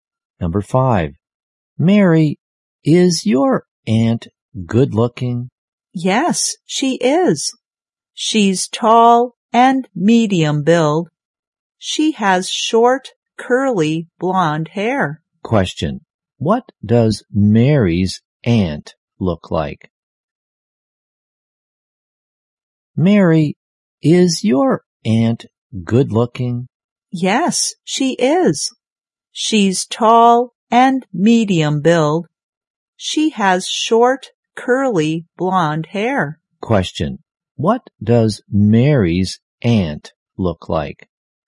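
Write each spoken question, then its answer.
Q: what does Mary's aunt look like?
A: Tall and medium build, with short, curly, blonde hair.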